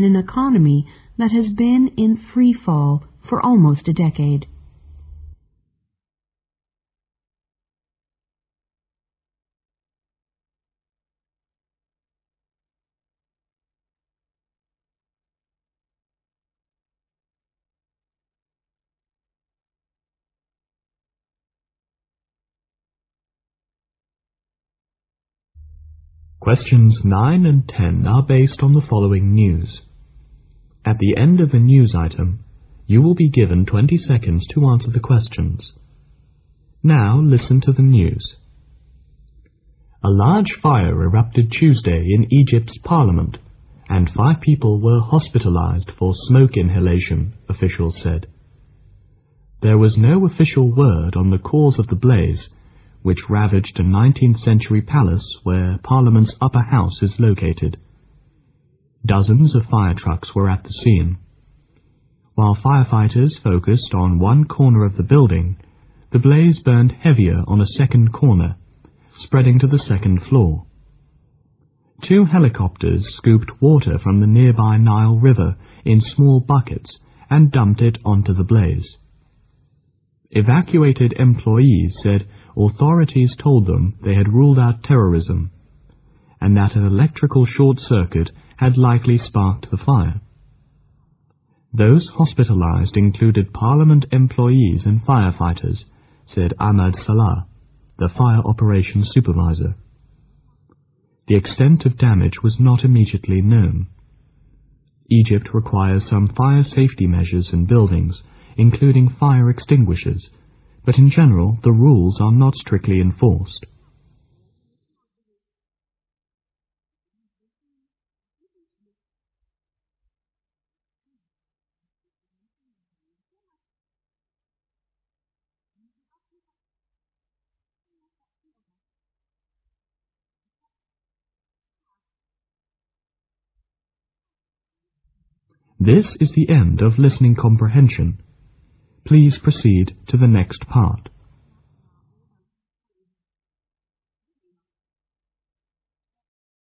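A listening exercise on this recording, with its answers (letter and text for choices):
Now listen to the news.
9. Which of the following is CORRECT?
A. A big fire erupted on the Nile River.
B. Helicopters were used to evacuate people.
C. Five people were taken to hospital for burns.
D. A big fire took place on two floors.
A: D. A big fire took place on two floors.

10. The likely cause of the big fire is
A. electrical short-cut.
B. lack of fire-satefy measures.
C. terrorism.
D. not known.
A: A. electrical short-cut.

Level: 英语专业八级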